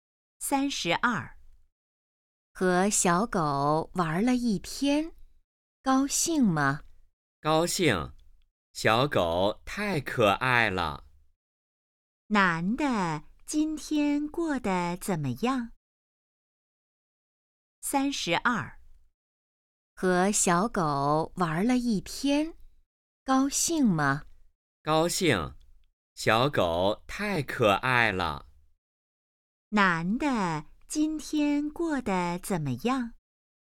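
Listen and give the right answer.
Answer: 很高兴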